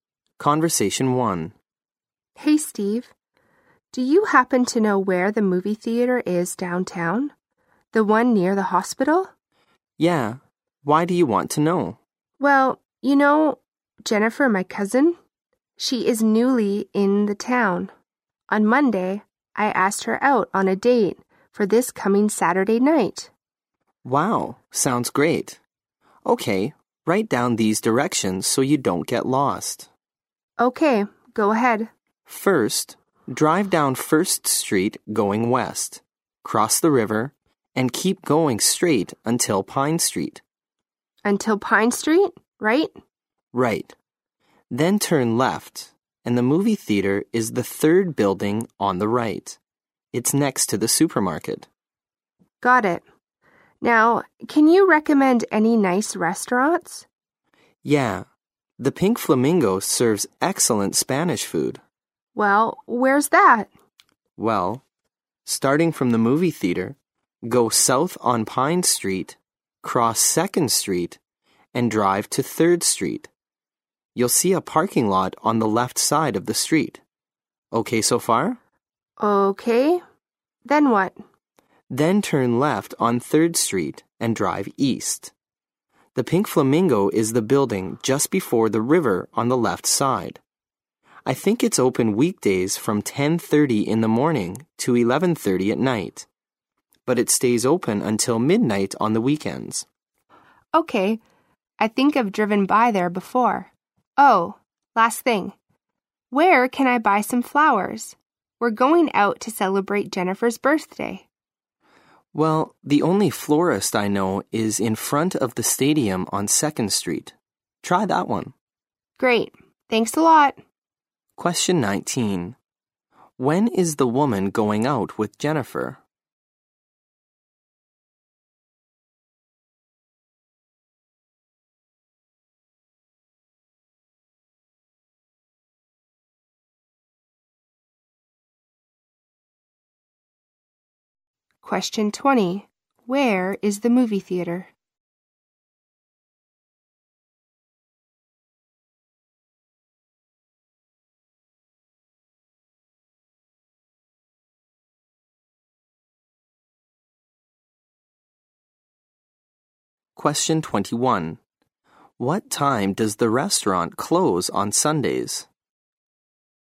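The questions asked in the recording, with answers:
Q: When is the woman going out with Jennifer?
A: Saturday night

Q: Where is the movie theater?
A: On Pine Street, the third building on the right, next to the supermarket

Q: What time does the restaurant close on Sundays?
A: At midnight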